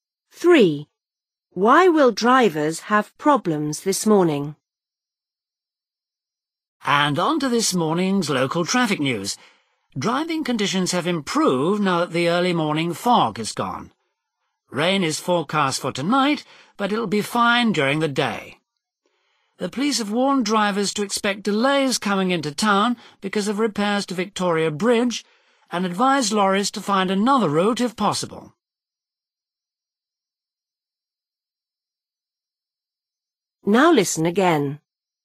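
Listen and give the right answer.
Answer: because of repairs to Victoria Bridge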